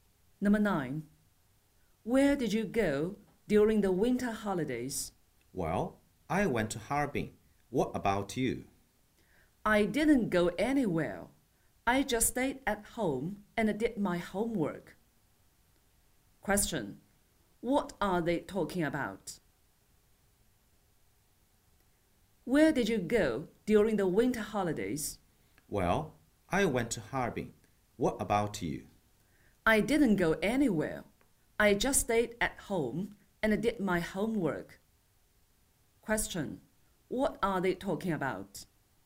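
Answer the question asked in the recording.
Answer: Their winter holidays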